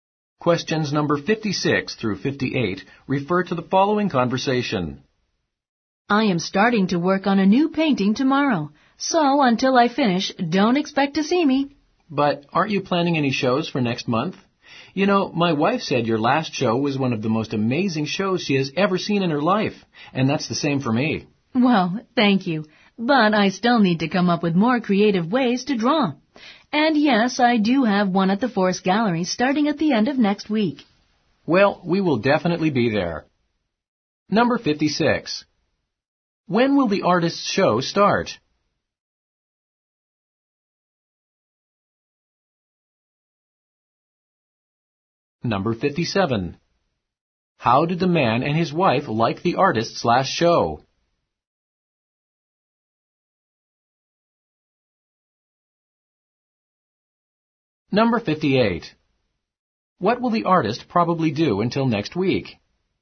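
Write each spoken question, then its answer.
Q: When will the artist's show start?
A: At the end of next week

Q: How did the man and his wife like the artist's last show?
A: They found it amazing

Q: What will the artist probably do until next week?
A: Work on a new painting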